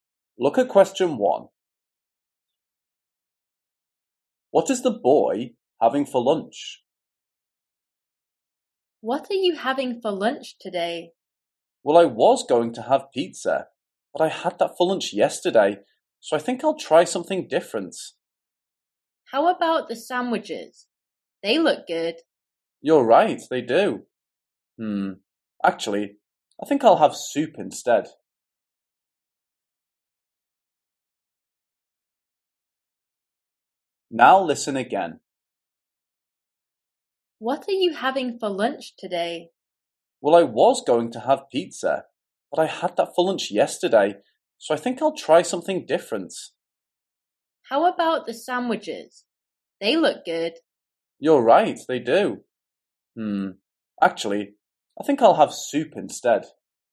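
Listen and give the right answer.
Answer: soup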